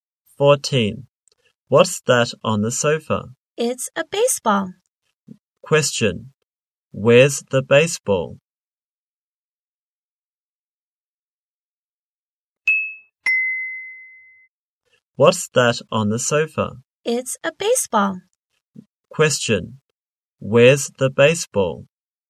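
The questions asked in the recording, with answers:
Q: Where's the baseball?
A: On the sofa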